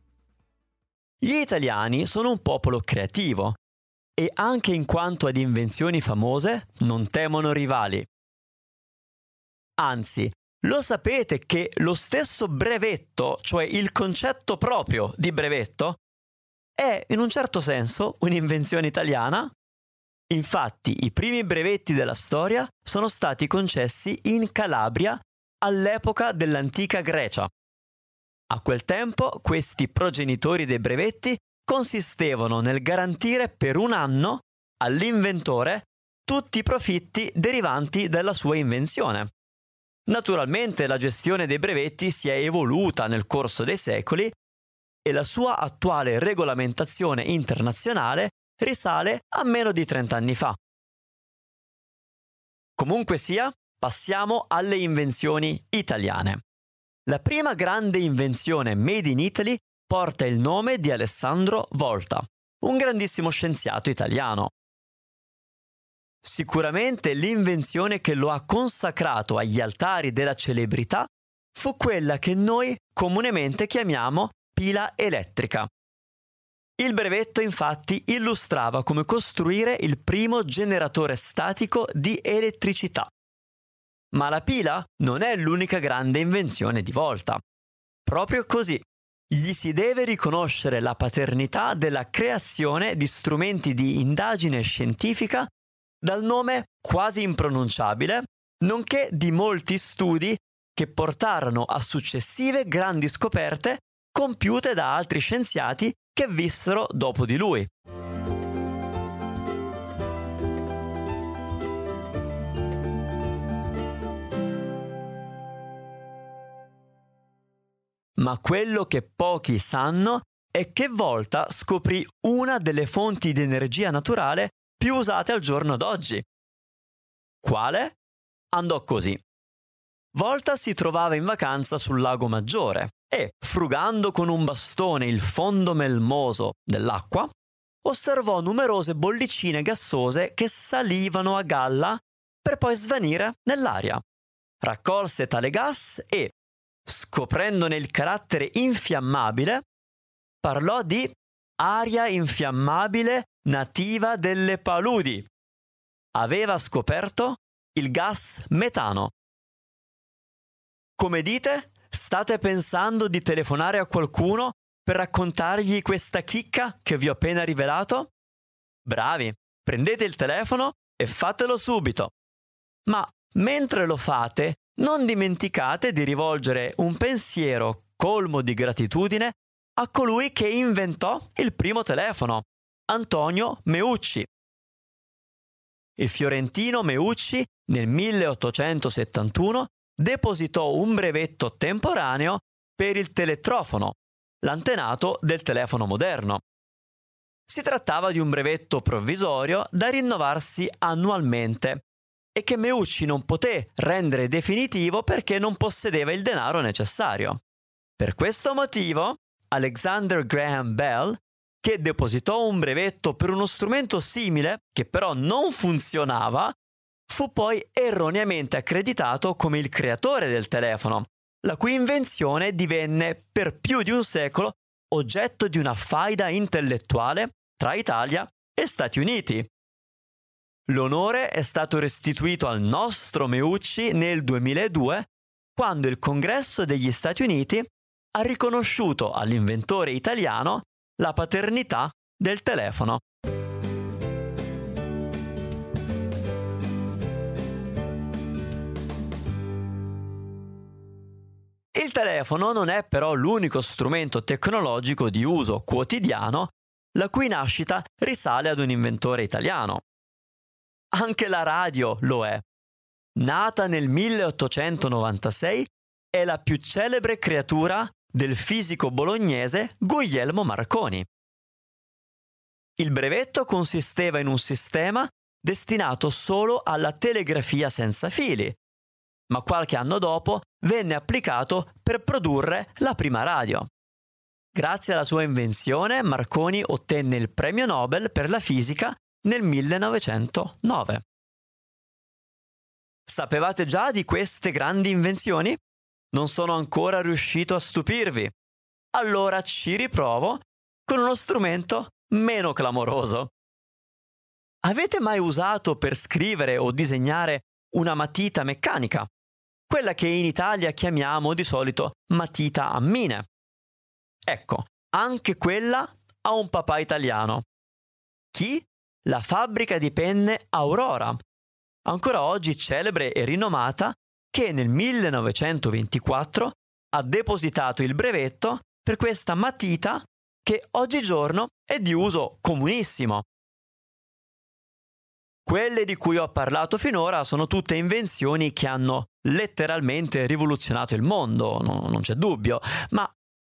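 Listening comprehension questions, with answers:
Here are your TRUE/ FALSE Comprehension questions.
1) Il "brevetto" è stato inventato 30 anni fa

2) Alexander Graham Bell ha inventato il telefono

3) L'invenzione del telefono è stata oggetto di una faida tra Italia e USA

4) Gli Stati Uniti hanno riconosciuto a Meucci la paternità del telefono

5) La "matita a mine" è una penna esplosiva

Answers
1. Falso
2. Falso
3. Vero
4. Vero
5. Falso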